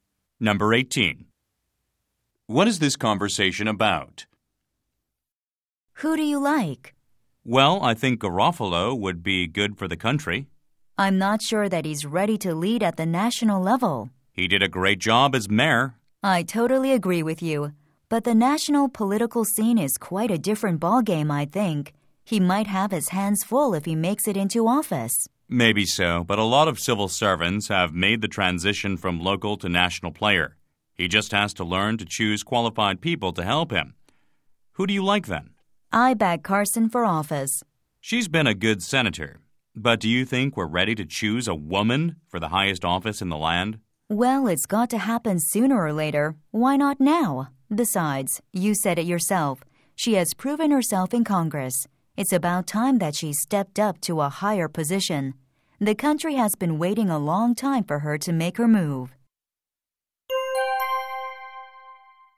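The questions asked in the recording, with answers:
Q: What is this conversation about?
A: Which candidate each of them supports for national office (Garofalo or Carson)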